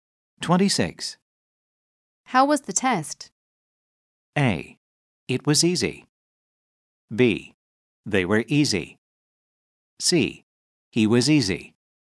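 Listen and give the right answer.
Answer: A: It was easy.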